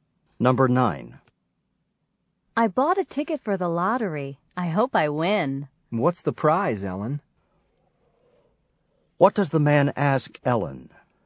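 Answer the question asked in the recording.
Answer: What the lottery prize is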